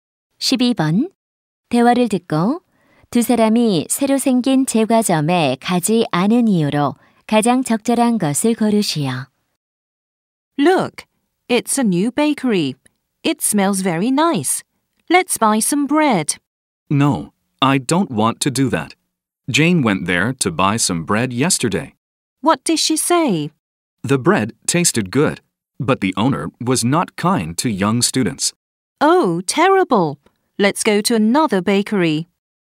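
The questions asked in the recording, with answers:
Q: 대화를 듣고 두 사람이 새로 생긴 제과점에 가지 않은 이유로 가장 적절한 것을 고르시오.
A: 주인이 어린 학생들에게 불친절해서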